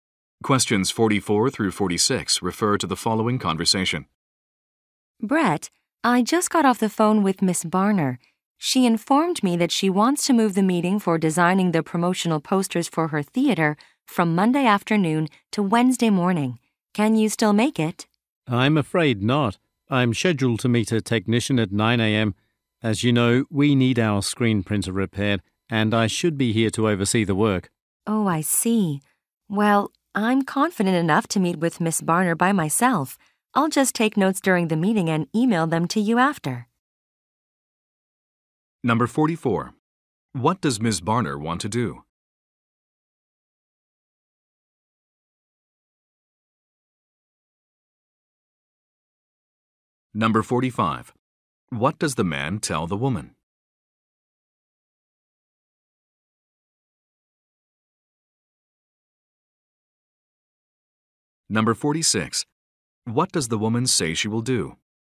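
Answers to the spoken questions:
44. Move the meeting to Wednesday morning
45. He can't attend because he is meeting a technician
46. Meet Miss Barner alone and email him notes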